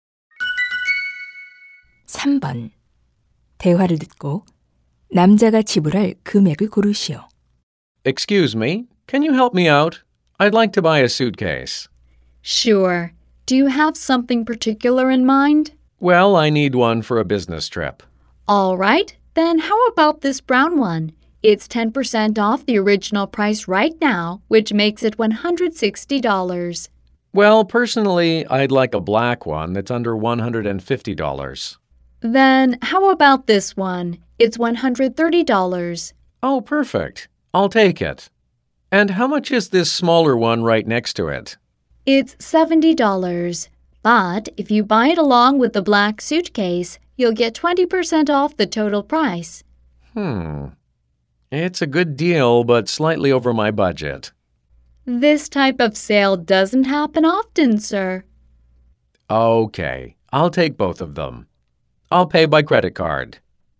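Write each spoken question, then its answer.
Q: 대화를 듣고 남자가 지불할 금액을 고르시오.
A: $160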